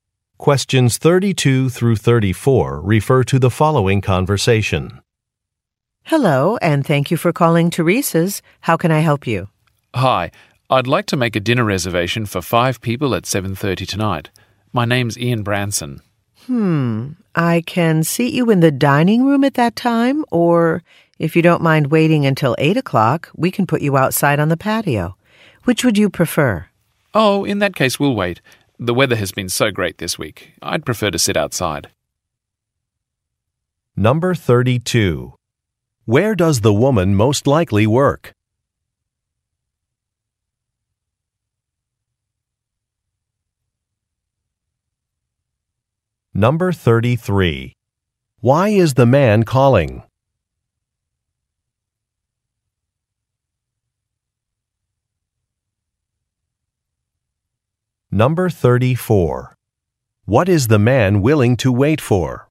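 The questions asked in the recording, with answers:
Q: Where does the woman most likely work?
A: At a restaurant (Teresa's)

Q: Why is the man calling?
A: To make a dinner reservation for 5 people

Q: What is the man willing to wait for?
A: A table outside on the patio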